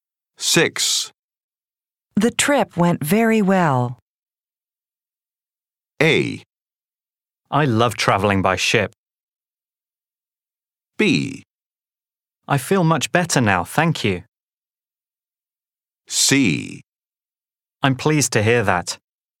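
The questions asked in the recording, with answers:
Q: The trip went very well.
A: C: I'm pleased to hear that.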